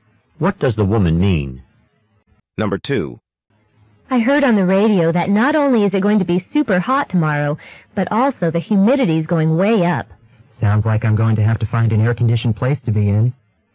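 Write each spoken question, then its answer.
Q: What does the man mean?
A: He will need to find somewhere air-conditioned to stay cool tomorrow.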